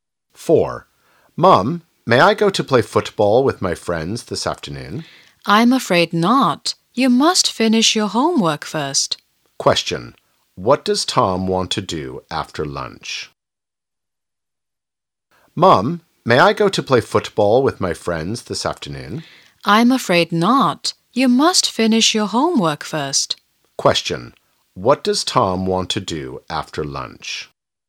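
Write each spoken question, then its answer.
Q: Question. What does Tom want to do after lunch?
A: Play football with his friends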